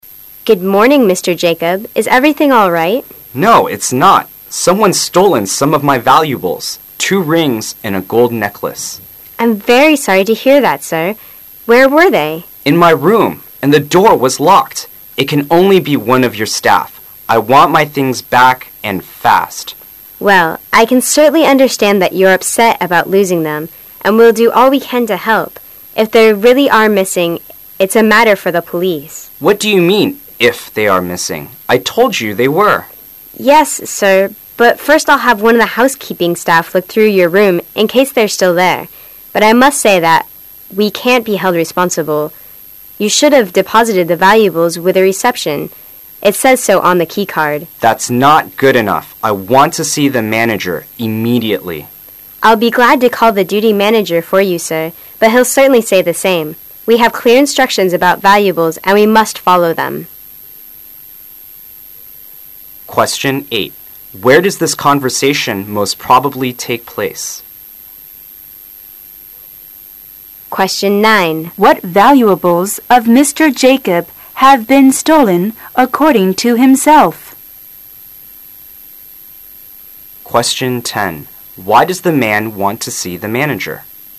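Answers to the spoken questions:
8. In a hotel
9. Two rings and a gold necklace
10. He is not satisfied with the receptionist's response that the hotel can't be held responsible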